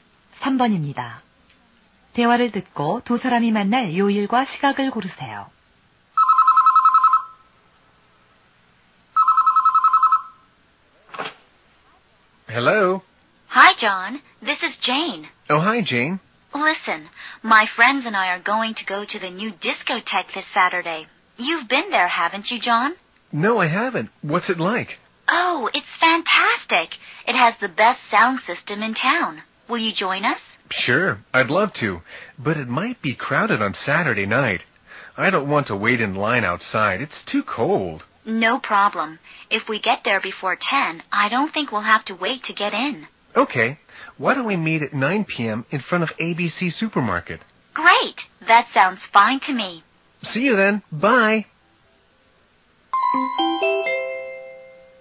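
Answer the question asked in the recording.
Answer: 토요일 오후 9시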